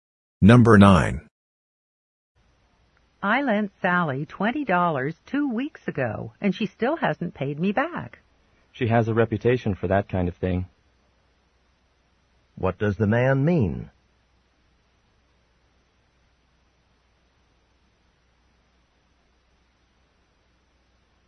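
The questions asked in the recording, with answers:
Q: What does the man mean?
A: Sally often doesn't pay back money she borrows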